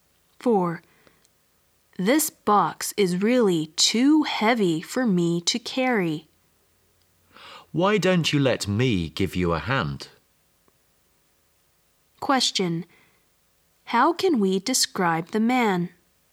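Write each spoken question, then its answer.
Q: How can we describe the man?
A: Helpful.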